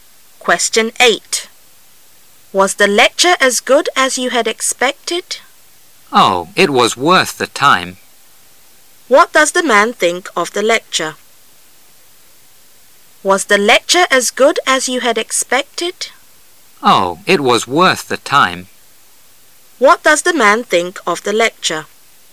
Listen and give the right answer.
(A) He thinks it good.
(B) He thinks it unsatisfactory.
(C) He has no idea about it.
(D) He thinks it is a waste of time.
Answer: (A) He thinks it good.

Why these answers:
观点态度题。通过对话中的关键词worth"值得",可知男士应该认为演讲还不错。